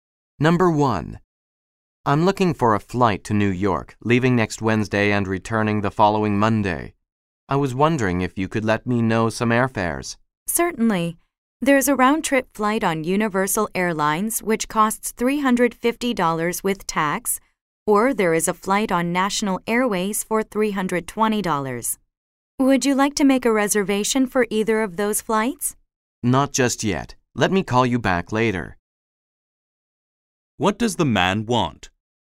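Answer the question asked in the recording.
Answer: To find out airfares for a flight to New York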